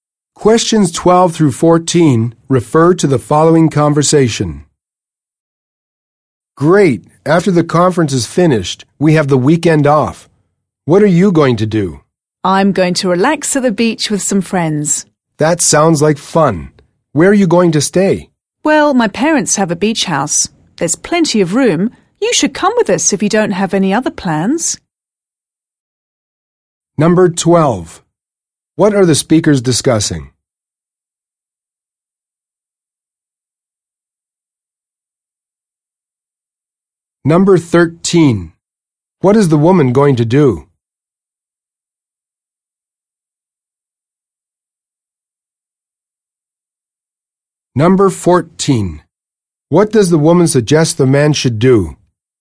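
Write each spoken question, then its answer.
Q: What are the speakers discussing?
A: Plans for the weekend after the conference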